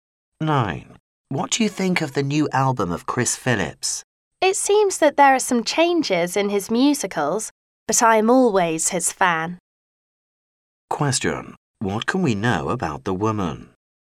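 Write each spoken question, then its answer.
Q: What can we know about the woman?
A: She is still a fan of Chris Phillips.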